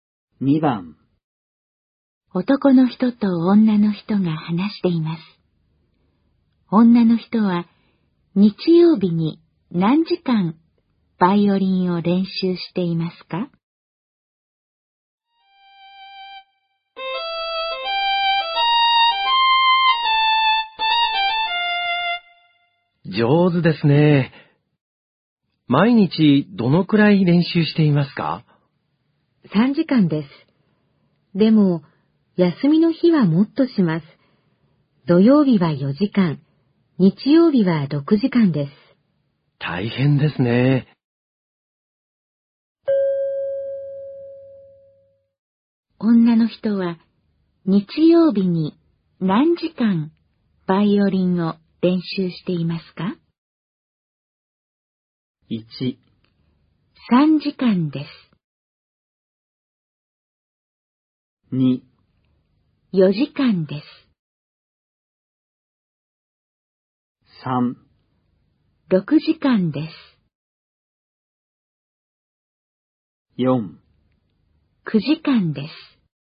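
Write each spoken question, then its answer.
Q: 女の人は日曜日に何時間バイオリンを練習していますか?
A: 3: 6時間です。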